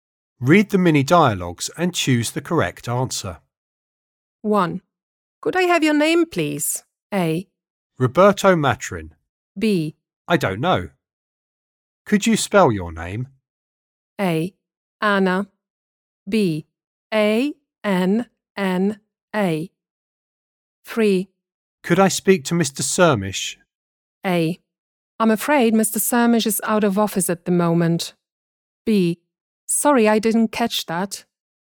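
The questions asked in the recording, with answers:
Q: Could I have your name, please?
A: A: Roberto Matrin.

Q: Could I speak to Mr. Sirmish?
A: A: I'm afraid Mr. Sirmish is out of office at the moment.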